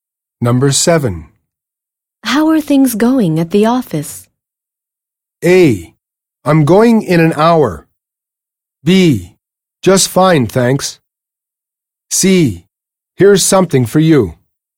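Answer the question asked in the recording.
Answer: B: Just fine, thanks.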